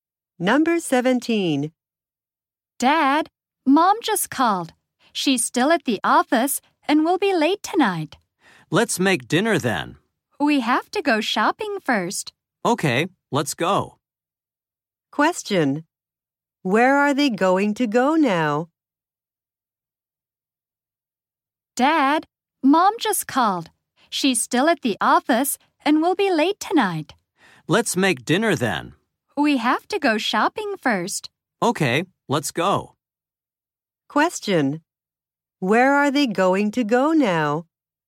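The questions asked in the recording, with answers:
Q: Where are they going to go now?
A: Shopping.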